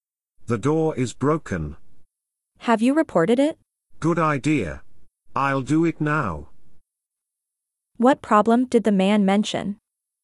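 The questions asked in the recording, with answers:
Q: What problem did the man mention?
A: The door is broken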